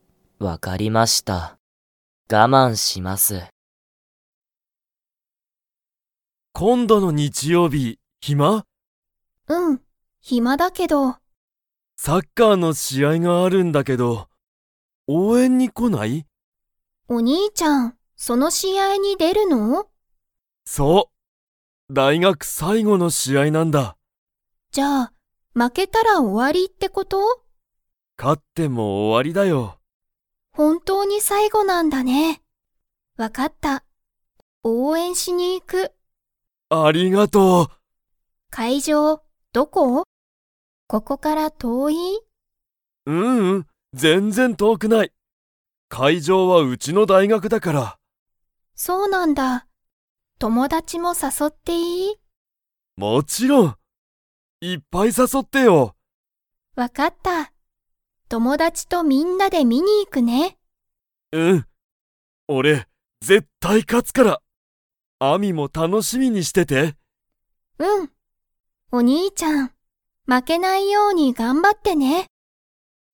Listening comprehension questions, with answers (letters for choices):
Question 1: 日曜日(にちようび)、何(なん)の試合(しあい)がありますか?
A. バレー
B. テニス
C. バスケットボール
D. サッカー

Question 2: アミは、試合(しあい)に友達(ともだち)を 。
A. 誘(さそ)う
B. 誘(さそ)わない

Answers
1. D
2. A

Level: Level 4